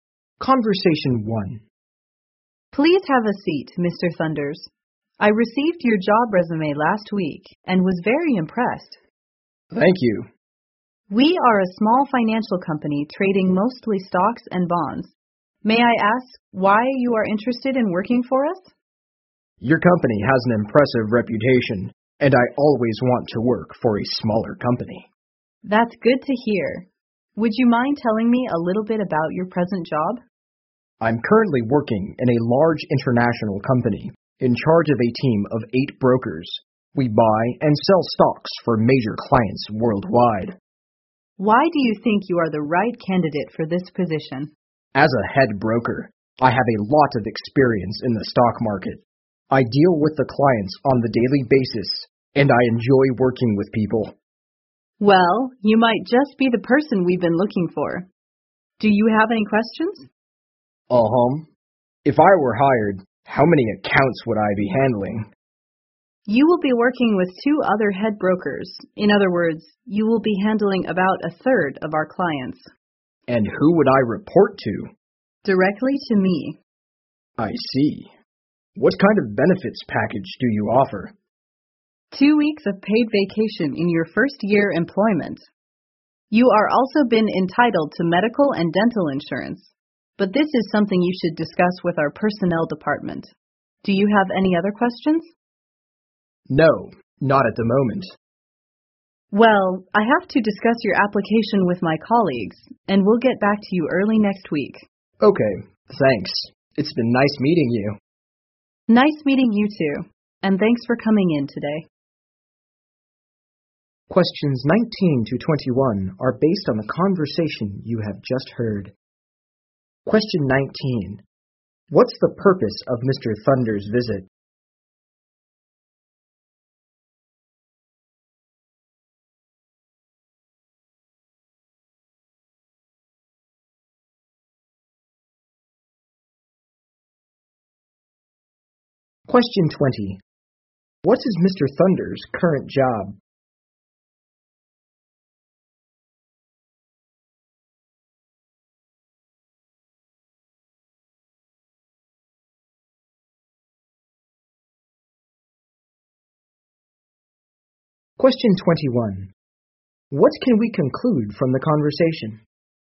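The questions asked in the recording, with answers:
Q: What's the purpose of Mr. Thunder's visit?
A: To have a job interview

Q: What is Mr. Thunder's current job?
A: Head broker leading a team of 8 brokers at a large international company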